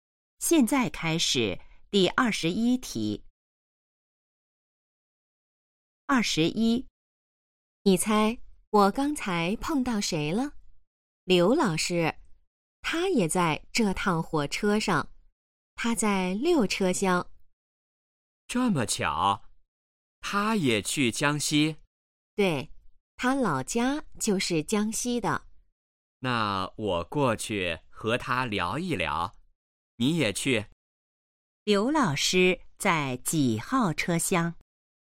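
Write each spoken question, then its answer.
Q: 刘老师在几号车厢?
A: 六车厢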